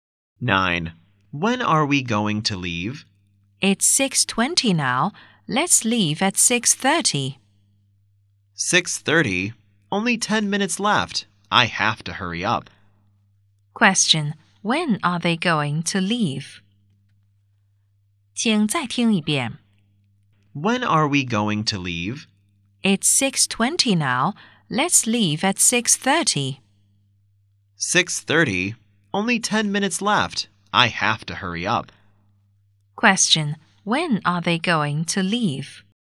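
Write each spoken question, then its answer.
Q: When are they going to leave?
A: At 6:30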